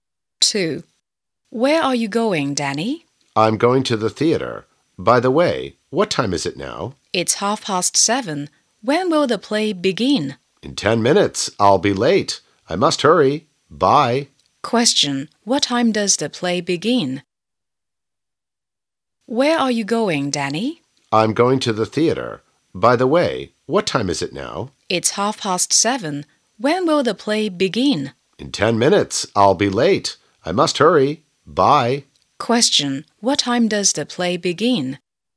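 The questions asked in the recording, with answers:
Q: What time does the play begin?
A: At 7:40.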